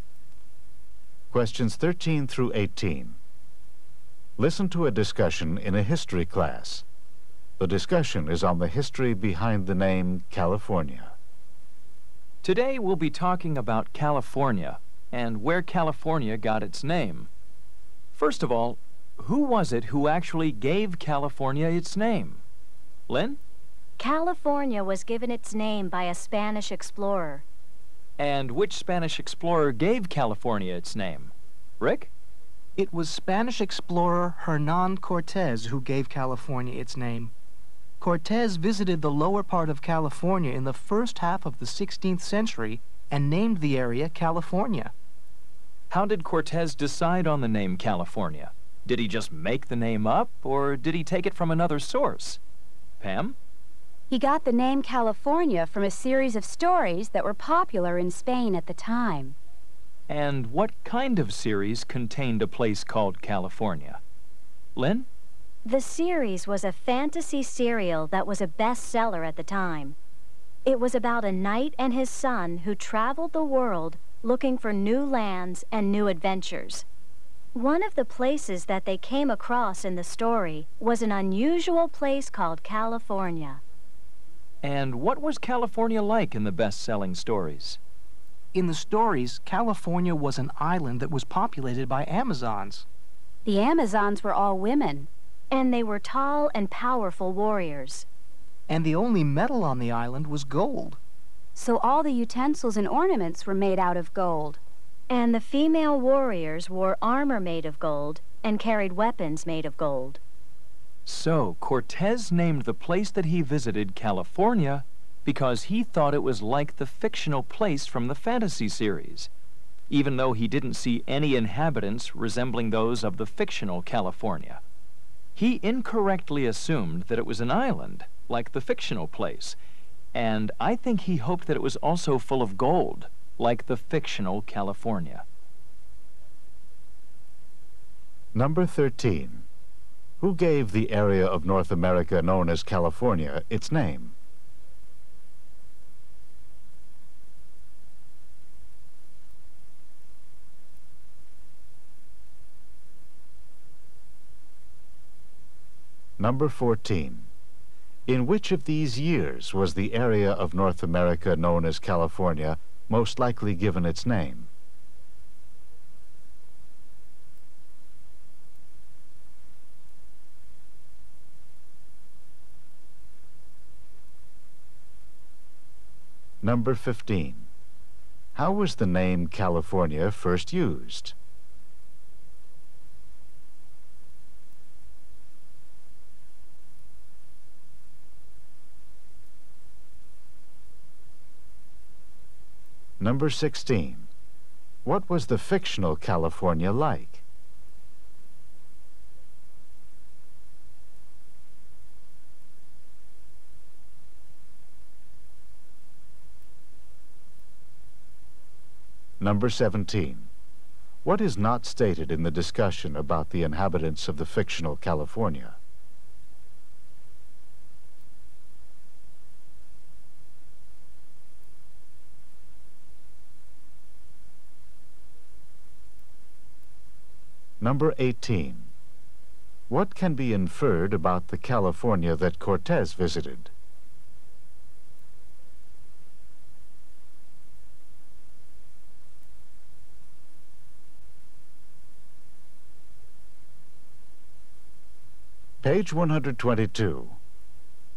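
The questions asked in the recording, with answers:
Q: Who gave the area of North America known as California its name?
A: Hernan Cortes, a Spanish explorer

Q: How was the name California first used?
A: As a place in a popular Spanish fantasy series

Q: What was the fictional California like?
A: An island of Amazon women warriors where the only metal was gold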